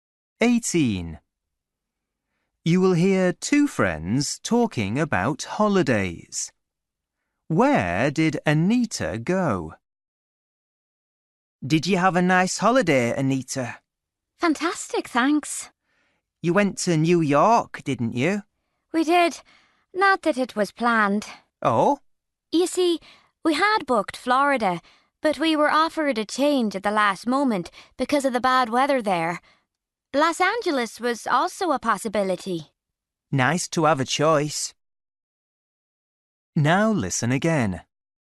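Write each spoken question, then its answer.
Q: Where did Anita go?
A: New York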